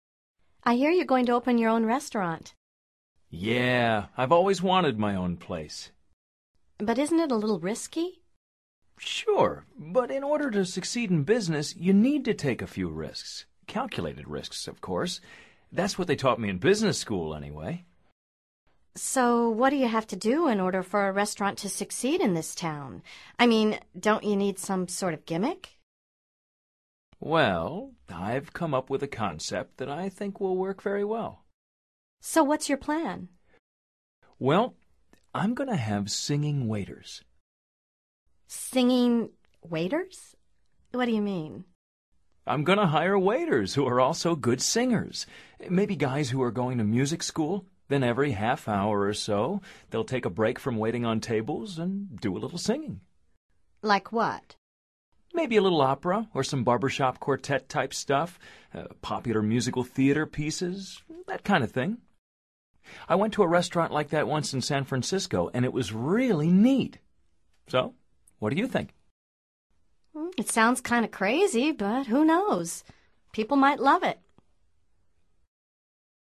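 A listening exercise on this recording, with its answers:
Activity 82: Basándote en los comentarios anteriores responde estas preguntas. Verifica luego las respuestas correctas.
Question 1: What's Mikel going to open?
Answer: His own restaurant.

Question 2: Does he think it may be a little risky?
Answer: Yes, but you need to take a few calculated risks.

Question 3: Mikel says that you need to take a few "what" in order to succeed in business?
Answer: Risks (calculated risks).

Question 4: Where did he learn about succeeding in business?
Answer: In business school.

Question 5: Does Wanda think he needs a "gimmick"?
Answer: Yes.

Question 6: What will be special about Mikel's restaurant?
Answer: It will have singing waiters.

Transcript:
I hear you're going to open your own restaurant.
Yeah, I've always wanted my own place.
But isn't it a little risky?
Sure, but in order to succeed in business, you need to take a few risks – calculated risks, of course. 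That's what they taught me in business school, anyway!
So what do you have to do in order for a restaurant to succeed in this town? I mean, don't you need some sort of gimmick?
Well, I've come up with a concept that I think will work very well.
So what's your plan?
Well ... I'm going to have singing waiters.
Singing ... waiters? What do you mean?
I'm going to hire waiters who are also good singers – maybe guys who are going to music school. Then every half hour or so, they'll take a break from waiting on tables and do a little singing.
Like what?
Maybe a little opera or some barber shop quartet-type stuff, popular musical theater pieces ... that kind of thing. I went to a restaurant like that once in San Francisco, and it was really neat.
It sounds kind of crazy, but who knows? People might love it.

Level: Nivel Avanzado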